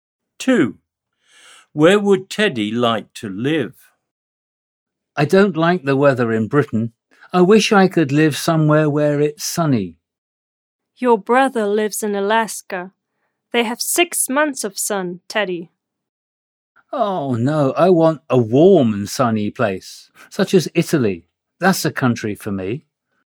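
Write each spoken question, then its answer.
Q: Where would Teddy like to live?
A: Italy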